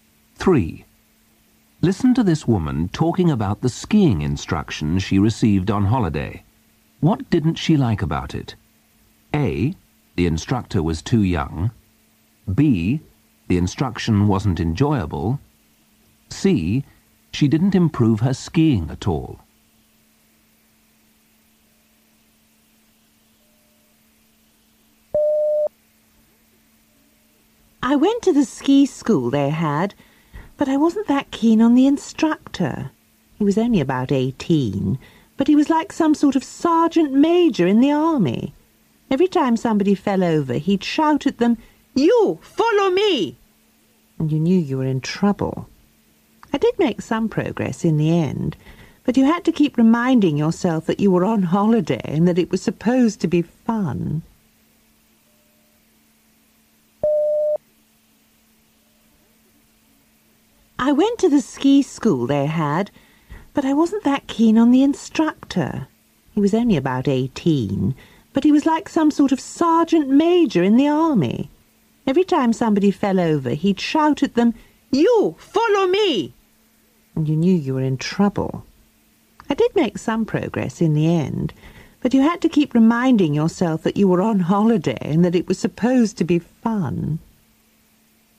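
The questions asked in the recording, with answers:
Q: What didn't she like about it?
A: B: The instruction wasn't enjoyable.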